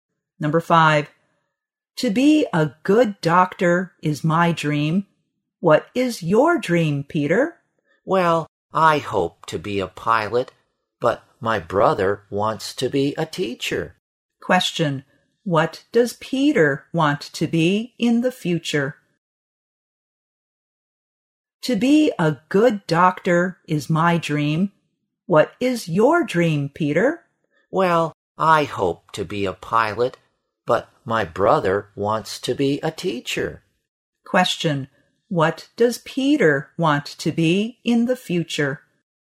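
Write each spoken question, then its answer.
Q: What does Peter want to be in the future?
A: A pilot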